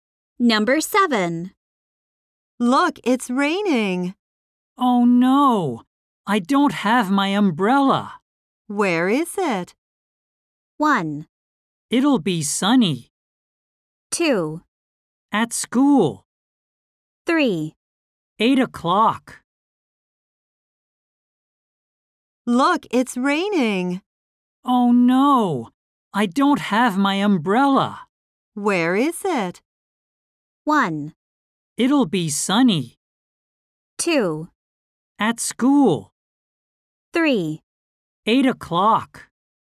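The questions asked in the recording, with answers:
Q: Where is it?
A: 2: At school.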